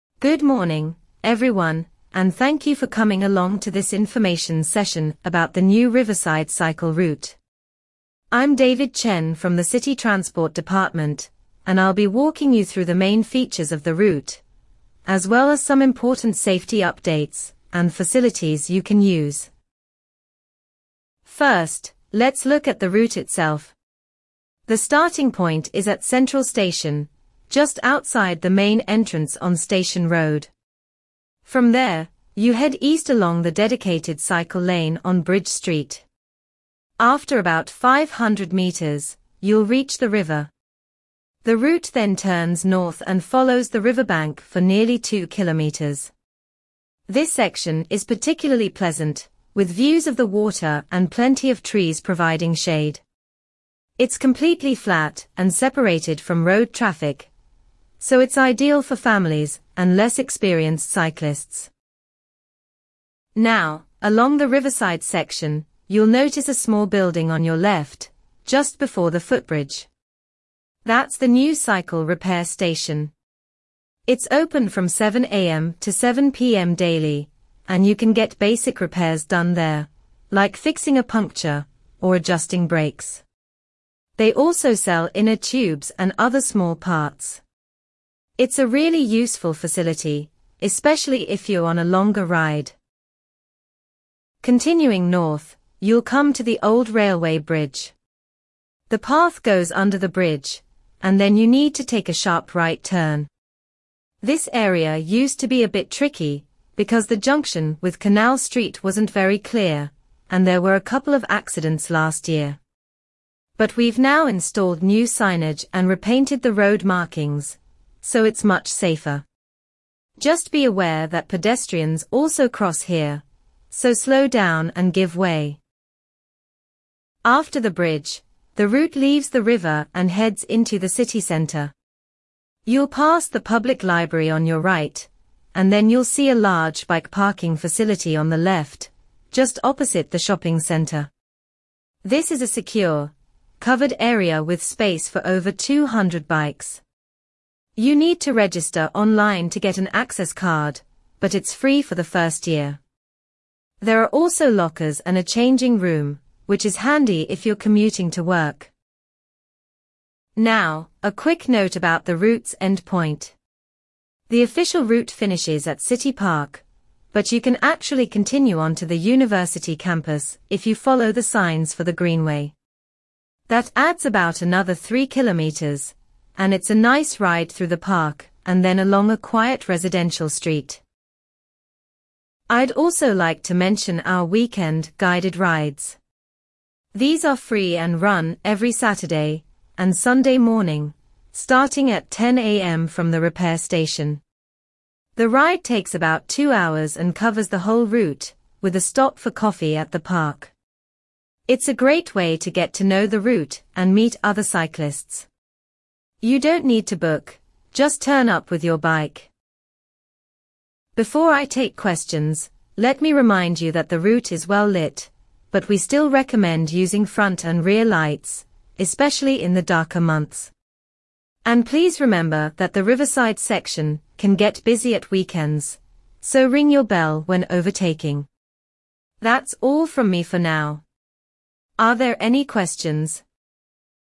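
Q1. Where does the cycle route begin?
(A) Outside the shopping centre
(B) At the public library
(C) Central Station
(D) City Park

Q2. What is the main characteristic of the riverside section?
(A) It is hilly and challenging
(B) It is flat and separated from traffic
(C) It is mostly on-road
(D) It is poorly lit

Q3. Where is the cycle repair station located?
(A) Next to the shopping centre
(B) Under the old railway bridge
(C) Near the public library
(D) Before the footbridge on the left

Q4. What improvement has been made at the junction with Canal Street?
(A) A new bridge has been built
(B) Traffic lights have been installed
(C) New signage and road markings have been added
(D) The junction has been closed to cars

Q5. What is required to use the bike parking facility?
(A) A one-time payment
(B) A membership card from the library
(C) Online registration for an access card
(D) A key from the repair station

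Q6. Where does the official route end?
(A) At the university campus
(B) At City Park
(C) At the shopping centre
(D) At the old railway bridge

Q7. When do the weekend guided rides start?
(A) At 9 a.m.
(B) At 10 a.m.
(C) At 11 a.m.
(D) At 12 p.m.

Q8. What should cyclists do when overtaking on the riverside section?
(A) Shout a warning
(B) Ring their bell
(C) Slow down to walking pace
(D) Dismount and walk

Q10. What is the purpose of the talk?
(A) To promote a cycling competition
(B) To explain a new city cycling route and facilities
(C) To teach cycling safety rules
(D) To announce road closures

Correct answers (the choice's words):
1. Central Station
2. It is flat and separated from traffic
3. Before the footbridge on the left
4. New signage and road markings have been added
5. Online registration for an access card
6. At City Park
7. At 10 a.m.
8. Ring their bell
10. To explain a new city cycling route and facilities

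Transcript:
Good morning, everyone, and thank you for coming along to this information session about the new Riverside Cycle Route. I'm David Chen from the City Transport Department, and I'll be walking you through the main features of the route, as well as some important safety updates and facilities you can use.
First, let's look at the route itself. The starting point is at Central Station, just outside the main entrance on Station Road. From there, you head east along the dedicated cycle lane on Bridge Street. After about 500 metres, you'll reach the river. The route then turns north and follows the riverbank for nearly two kilometres. This section is particularly pleasant, with views of the water and plenty of trees providing shade. It's completely flat and separated from road traffic, so it's ideal for families and less experienced cyclists.
Now, along the riverside section, you'll notice a small building on your left, just before the footbridge. 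That's the new cycle repair station. It's open from 7 a.m. to 7 p.m. daily, and you can get basic repairs done there, like fixing a puncture or adjusting brakes. They also sell inner tubes and other small parts. It's a really useful facility, especially if you're on a longer ride.
Continuing north, you'll come to the old railway bridge. The path goes under the bridge, and then you need to take a sharp right turn. This area used to be a bit tricky because the junction with Canal Street wasn't very clear, and there were a couple of accidents last year. But we've now installed new signage and repainted the road markings, so it's much safer. Just be aware that pedestrians also cross here, so slow down and give way.
After the bridge, the route leaves the river and heads into the city centre. You'll pass the public library on your right, and then you'll see a large bike parking facility on the left, just opposite the shopping centre. 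This is a secure, covered area with space for over 200 bikes. You need to register online to get an access card, but it's free for the first year. There are also lockers and a changing room, which is handy if you're commuting to work.
Now, a quick note about the route's end point. The official route finishes at City Park, but you can actually continue on to the university campus if you follow the signs for the Greenway. That adds about another three kilometres, and it's a nice ride through the park and then along a quiet residential street.
I'd also like to mention our weekend guided rides. These are free and run every Saturday and Sunday morning, starting at 10 a.m. from the repair station. The ride takes about two hours and covers the whole route, with a stop for coffee at the park. It's a great way to get to know the route and meet other cyclists. You don't need to book, just turn up with your bike.
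Before I take questions, let me remind you that the route is well lit, but we still recommend using front and rear lights, especially in the darker months. And please remember that the riverside section can get busy at weekends, so ring your bell when overtaking. That's all from me for now. Are there any questions?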